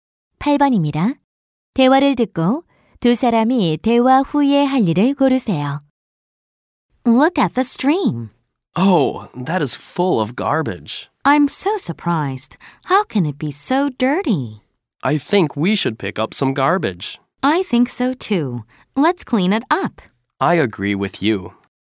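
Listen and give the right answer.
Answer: 개울의 쓰레기 줍기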